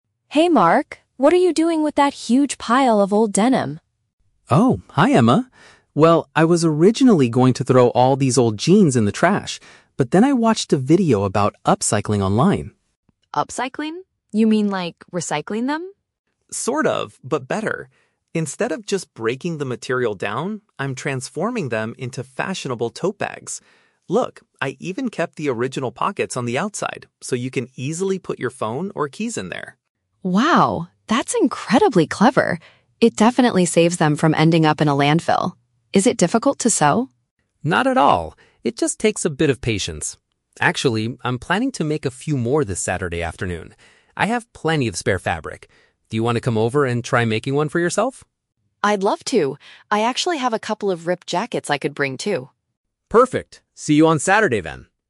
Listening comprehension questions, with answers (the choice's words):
Listen to the conversation between two friends and choose the correct answer (A, B, or C) for each question.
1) What was Mark's initial plan for his old clothes?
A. To turn them into new bags.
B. To put them in the garbage.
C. To give them to a local charity.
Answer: To put them in the garbage.

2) What is a special feature of the items Mark is creating?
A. They still have places to store small items.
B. They are entirely made of recycled plastic.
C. They are going to be sold at a high price.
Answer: They still have places to store small items.

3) What do the two friends agree to do?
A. Go shopping for fashionable clothes this weekend.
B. Watch a video about environmental protection.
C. Meet up to do some crafting together.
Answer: Meet up to do some crafting together.

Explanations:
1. Mark says, "I was originally going to throw all these old jeans in the trash." The phrase "put them in the garbage" is a paraphrase of "throw in the trash." Option (A) is a trap because turning them into bags is his current project, not his initial plan. Option (C) is a plausible idea for old clothes but is never mentioned.
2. Mark mentions that he "kept the original pockets... so you can easily put your phone or keys in there." "Places to store small items" is a paraphrase for "pockets for phone or keys." Option (B) is a trap; the topic is about recycling, but he is using denim/jeans, not plastic. Option (C) is not mentioned in the audio.
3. Mark invites Emma to "come over and try making one" this Saturday, and Emma accepts ("I'd love to!"). "Do some crafting together" is a paraphrase of making bags together. Option (A) is a trap; they mention the words "clothes" and "fashionable" earlier, but they are not going shopping. Option (B) is also a trap; Mark watched a video by himself earlier, but they aren't planning to watch one together.

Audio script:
Emma: Hey Mark! What are you doing with that huge pile of old denim?
Mark: Oh, hi Emma. Well, I was originally going to throw all these old jeans in the trash, but then I watched a video about upcycling online.
Emma: Upcycling? You mean like recycling them?
Mark: Sort of, but better! Instead of just breaking the material down, I'm transforming them into fashionable tote bags. Look, I even kept the original pockets on the outside so you can easily put your phone or keys in there.
Emma: Wow, that's incredibly clever! It definitely saves them from ending up in a landfill. Is it difficult to sew?
Mark: Not at all. It just takes a bit of patience. Actually, I'm planning to make a few more this Saturday afternoon. I have plenty of spare fabric. Do you want to come over and try making one for yourself?
Emma: I'd love to! I actually have a couple of ripped jackets I could bring, too.
Mark: Perfect! See you on Saturday, then.